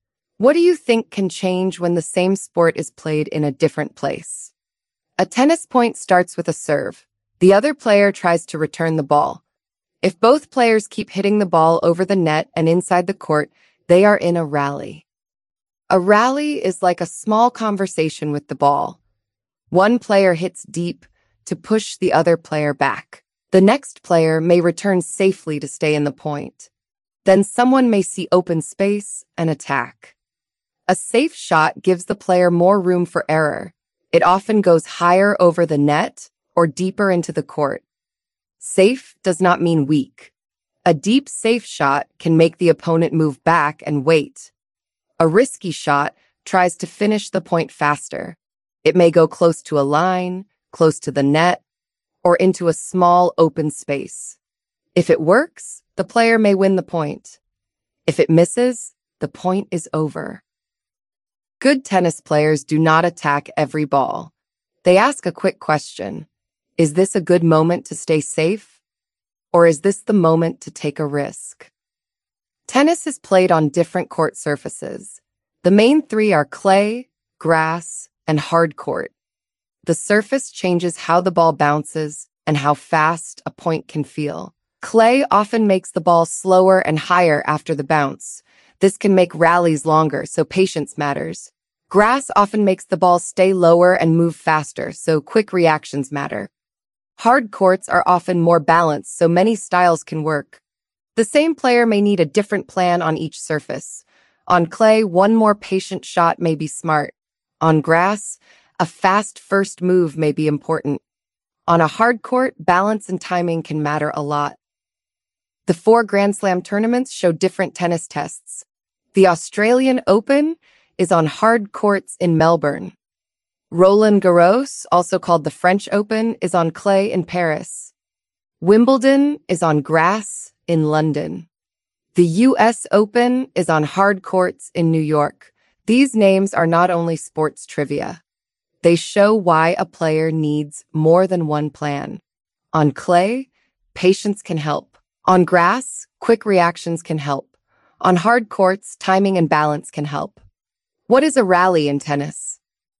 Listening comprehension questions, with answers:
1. Why do court surfaces matter?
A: They can change the bounce, speed, and plan of a tennis point.

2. Which tournament is played on grass?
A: Wimbledon is played on grass.

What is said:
In a sport, when is it better to play safe?
What do you think can change when the same sport is played in a different place?
A tennis point starts with a serve. The other player tries to return the ball.
The other player tries to return the ball. If both players keep hitting the ball over the net and inside the court, they are in a rally. A rally is like a small conversation with the ball. One player hits deep to push the other player back. The next player may return safely to stay in the point. Then someone may see open space and attack.
1. What is a rally in tennis?
Text to type: A safe shot gives the player more room for error. It often goes higher over the net or deeper into the court. Safe does not mean weak. A deep safe shot can make the opponent move back and wait. A risky shot tries to finish the point faster. It may go close to a line, close to the net, or into a small open space.
Lesson wordTier 1 · EssentialLearn nowlineFrom the lessonIt may go close to a line, close to the net, or into a small open space.Tap to flipAnswerlineWord
a boundary on a tennis court
If it works, the player may win the point.
If it misses, the point is over.
Good tennis players do not attack every ball.
They ask a quick question: Is this a good moment to stay safe, or is this the moment to take a risk?
3. Surfaces Change the Match
▶Play this part
Tennis is played on different court surfaces.
The main three are clay, grass, and hard court.
The surface changes how the ball bounces and how fast a point can feel.
Clay often makes the ball slower and higher after the bounce.
This can make rallies longer, so patience matters.
Grass often makes the ball stay lower and move faster, so quick reactions matter.
Hard courts are often more balanced, so many styles can work.
The same player may need a different plan on each surface.
On clay, one more patient shot may be smart.
On grass, a fast first move may be important.
On a hard court, balance and timing can matter a lot.
▶Play this part
The four Grand Slam tournaments show different tennis tests.
The Australian Open is on hard courts in Melbourne.
Roland-Garros, also called the French Open, is on clay in Paris.
The US Open is on hard courts in New York.
These names are not only sports trivia.
They show why a player needs more than one plan.
On clay, patience can help.
On grass, quick reactions can help.
On hard courts, timing and balance can help.